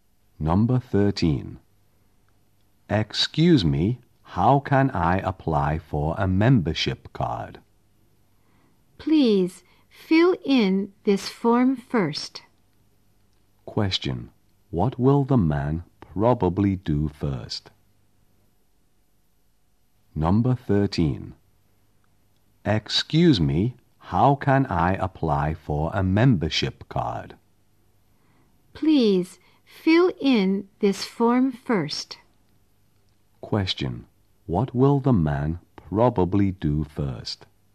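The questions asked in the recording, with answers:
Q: Question. What will the man probably do first?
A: Fill in a form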